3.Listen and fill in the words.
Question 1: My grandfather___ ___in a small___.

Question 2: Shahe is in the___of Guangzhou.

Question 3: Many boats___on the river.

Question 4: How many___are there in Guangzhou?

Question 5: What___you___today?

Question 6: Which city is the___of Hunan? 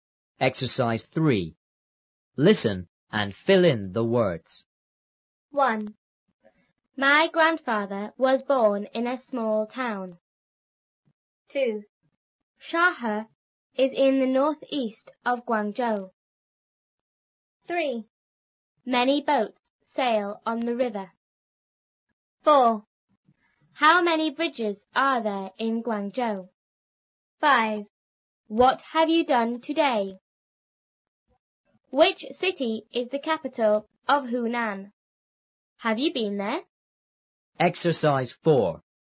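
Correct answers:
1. was born; town
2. northeast
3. sail
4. bridges
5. have; done
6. capital

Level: 初中英语广州版3B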